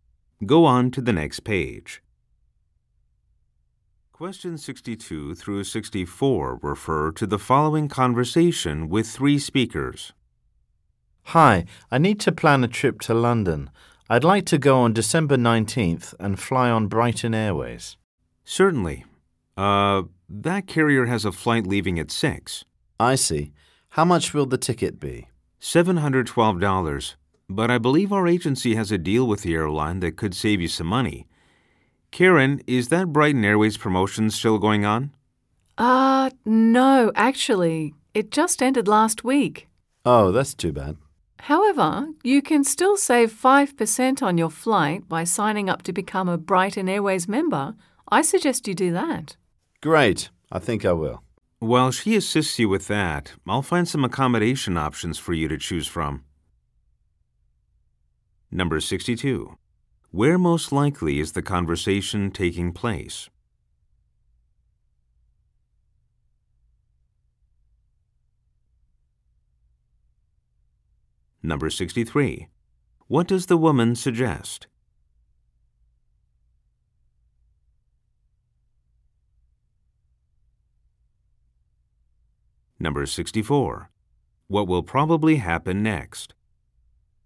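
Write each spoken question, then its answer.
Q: Where most likely is the conversation taking place?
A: At a travel agency

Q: What does the woman suggest?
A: Signing up to become a Brighton Airways member

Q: What will probably happen next?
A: The man will sign up for membership while an agent finds accommodation options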